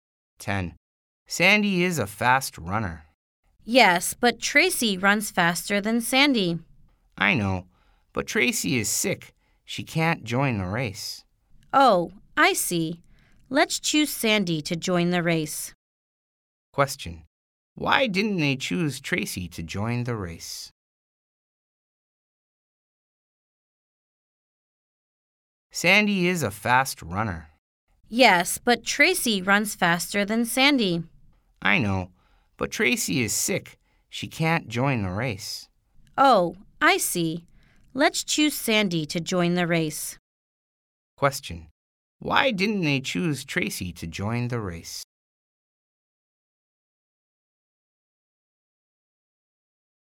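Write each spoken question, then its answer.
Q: Why didn't they choose Tracy to join the race?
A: Tracy is sick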